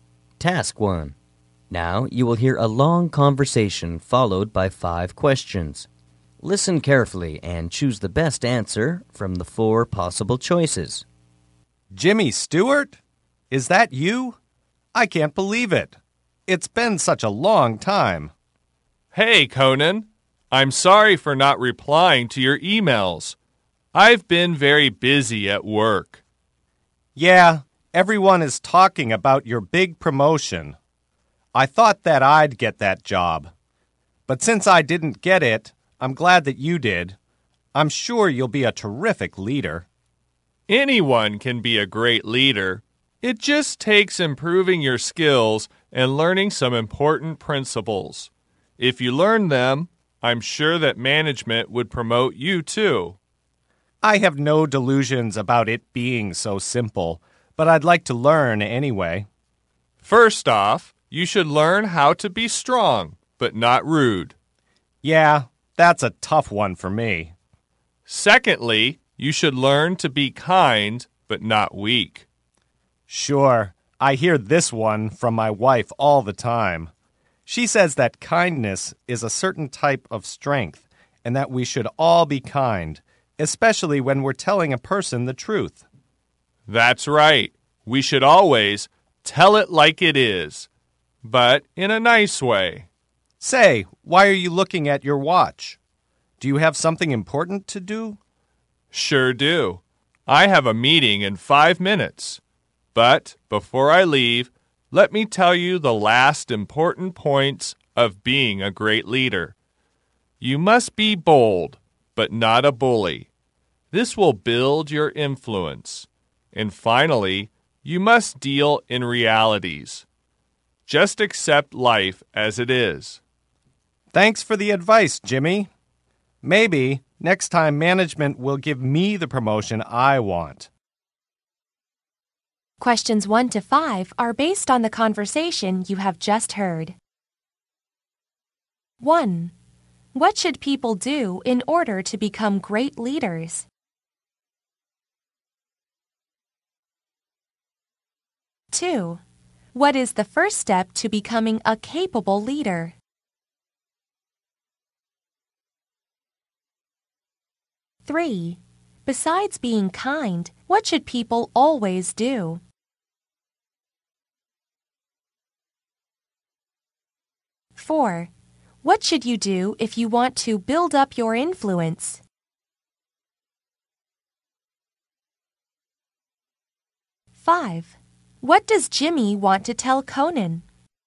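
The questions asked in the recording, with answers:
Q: What should people do in order to become great leaders?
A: Improve their skills and learn some important principles

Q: What is the first step to becoming a capable leader?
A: Learn to be strong but not rude

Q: Besides being kind, what should people always do?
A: Tell the truth (tell it like it is)

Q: What should you do if you want to build up your influence?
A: Be bold but not a bully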